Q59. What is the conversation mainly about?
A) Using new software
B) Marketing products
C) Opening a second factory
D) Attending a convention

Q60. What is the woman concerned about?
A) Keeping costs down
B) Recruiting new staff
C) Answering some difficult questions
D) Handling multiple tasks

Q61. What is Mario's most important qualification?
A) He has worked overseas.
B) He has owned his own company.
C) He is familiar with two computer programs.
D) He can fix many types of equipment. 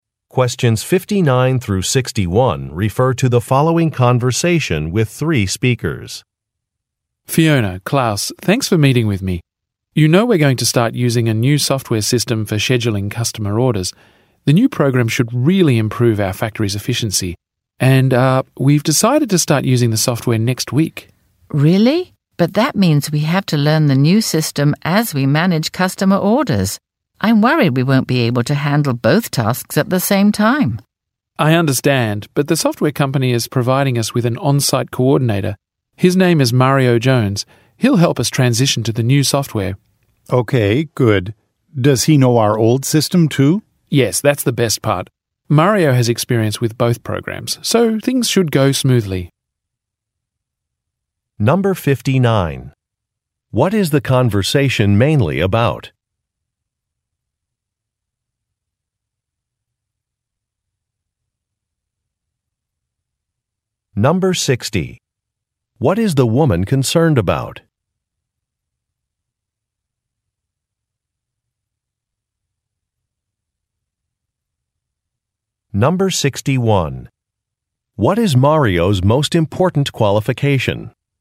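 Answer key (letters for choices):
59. A
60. D
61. C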